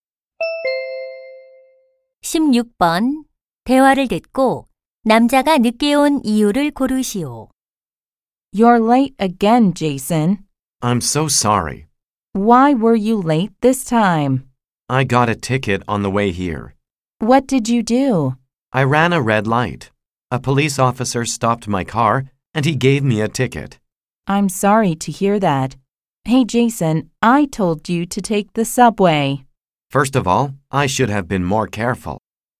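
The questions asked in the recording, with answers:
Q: 대화를 듣고 남자가 늦게 온 이유를 고르시오.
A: 신호 위반으로 딱지를 떼여서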